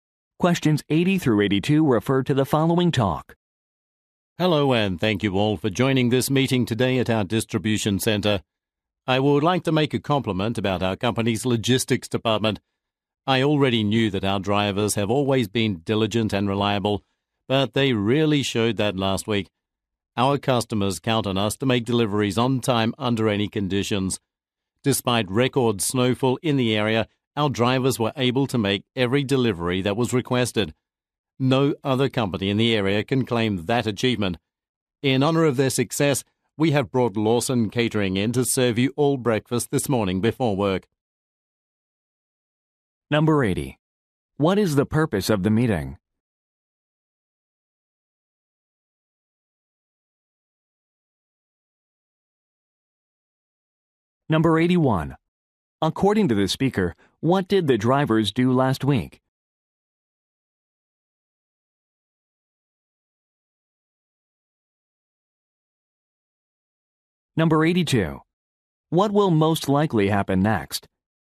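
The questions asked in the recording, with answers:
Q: What is the purpose of the meeting?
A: To praise the logistics department's drivers

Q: According to the speaker, what did the drivers do last week?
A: Made every delivery despite record snowfall

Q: What will most likely happen next?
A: Employees will be served breakfast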